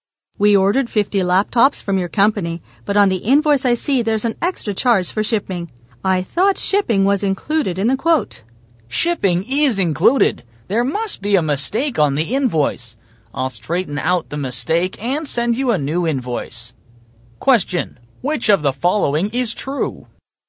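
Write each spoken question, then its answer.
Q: which of the following is true?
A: Shipping is included; the invoice has a mistake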